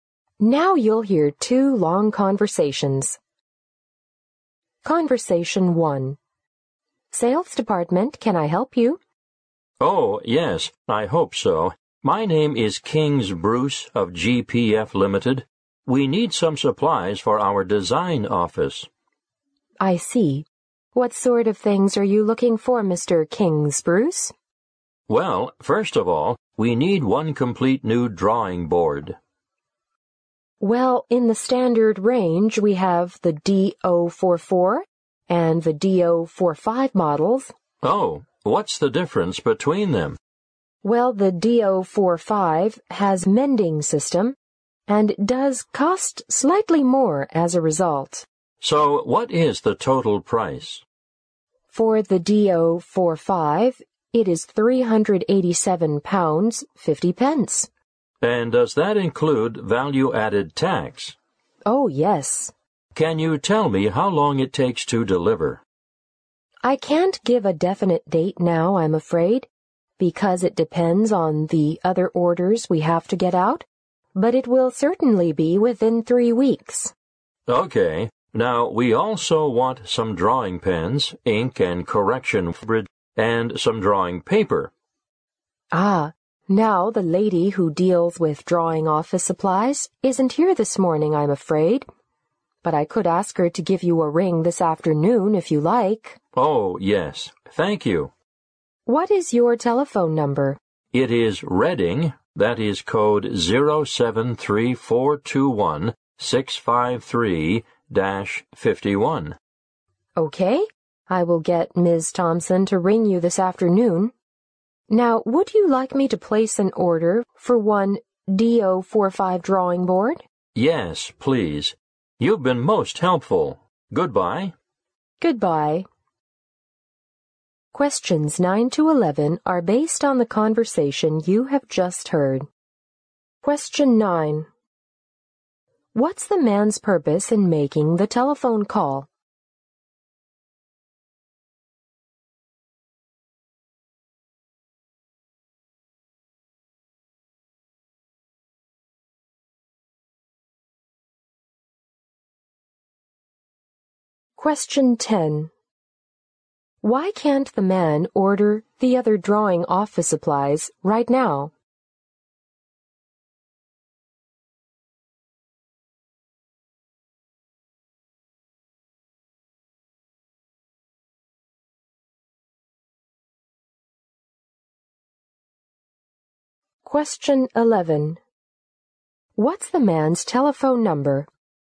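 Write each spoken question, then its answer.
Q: What's the man's purpose in making the telephone call?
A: To order supplies for his design office

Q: Why can't the man order the other drawing office supplies right now?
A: The woman who deals with them isn't there this morning

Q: What's the man's telephone number?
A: Reading, 073-421-653-51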